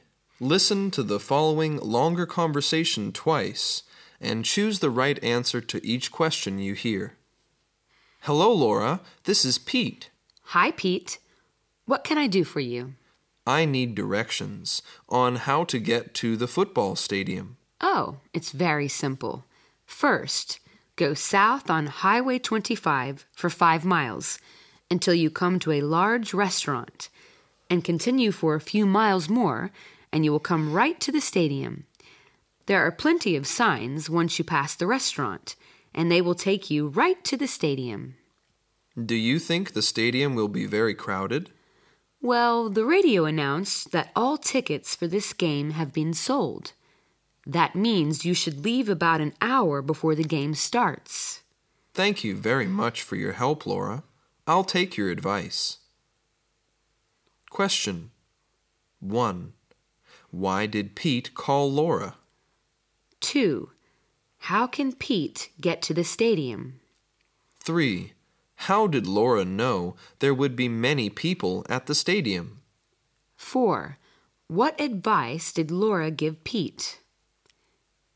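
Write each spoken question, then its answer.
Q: Why did Pete call Laura?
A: To ask for directions to the football stadium

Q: How can Pete get to the stadium?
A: Go south on Highway 25 past a large restaurant and follow the signs

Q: How did Laura know there would be many people at the stadium?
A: The radio said all tickets had been sold

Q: What advice did Laura give Pete?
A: Leave about an hour before the game starts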